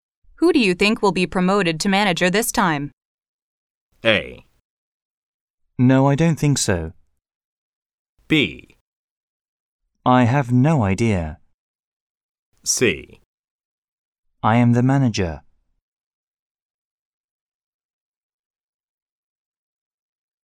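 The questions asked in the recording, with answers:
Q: Who do you think will be promoted to manager this time?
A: B: I have no idea.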